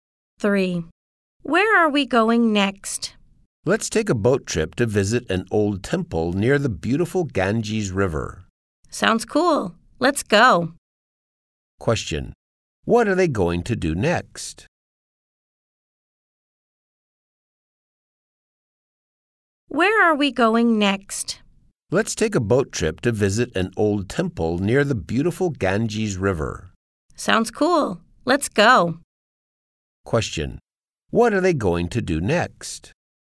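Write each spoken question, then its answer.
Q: What are they going to do next?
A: Take a boat trip to visit an old temple near the Ganges River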